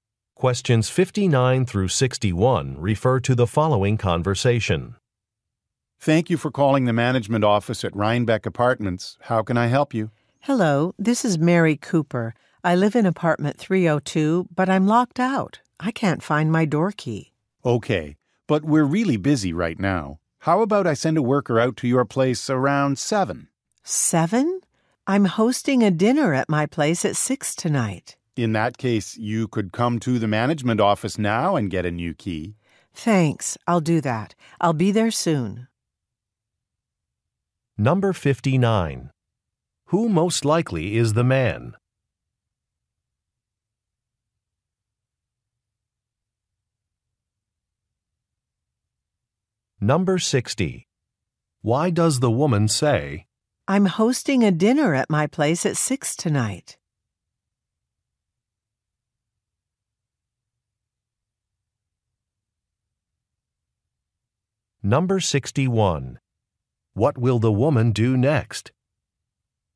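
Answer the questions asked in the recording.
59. An apartment manager.
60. 7 o'clock is too late for her.
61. Go to the management office to get a new key.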